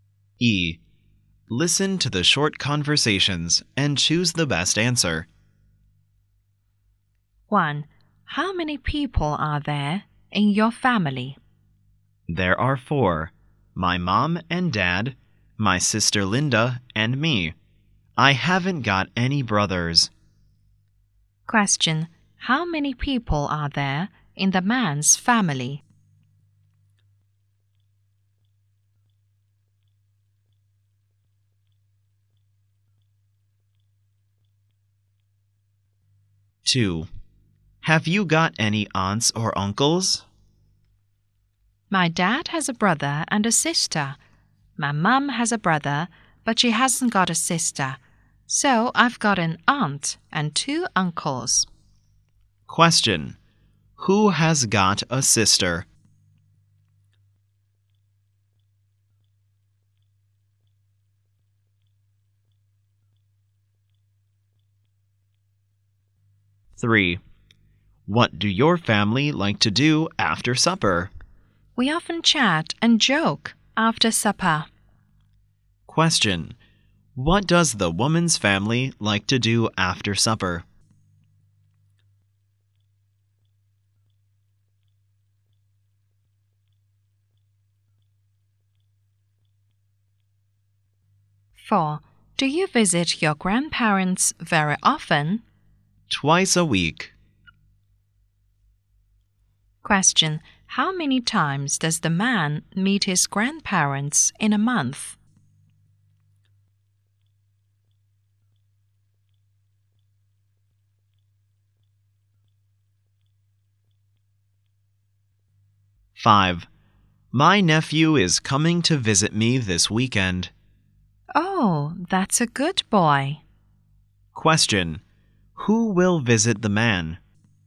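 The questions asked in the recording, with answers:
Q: How many people are there in the man's family?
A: Four

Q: Who has got a sister?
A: His dad

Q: What does the woman's family like to do after supper?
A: Chat and joke

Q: How many times does the man meet his grandparents in a month?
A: About eight times

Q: Who will visit the man?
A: His nephew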